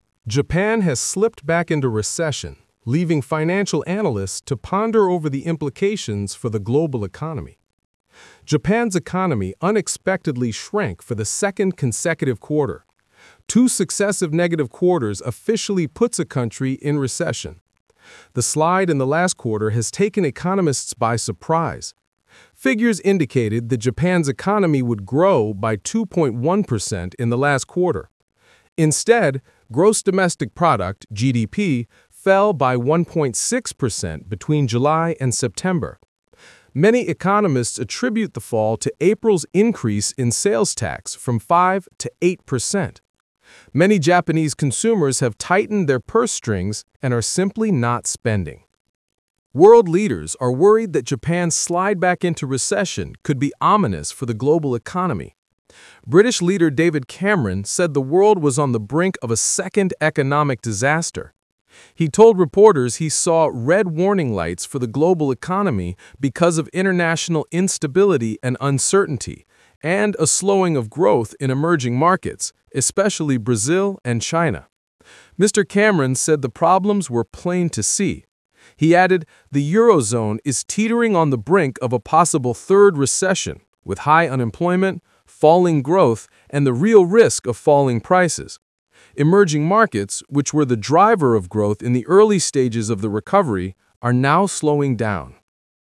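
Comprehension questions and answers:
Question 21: Who is thinking about implications for the global economy?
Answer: financial analysts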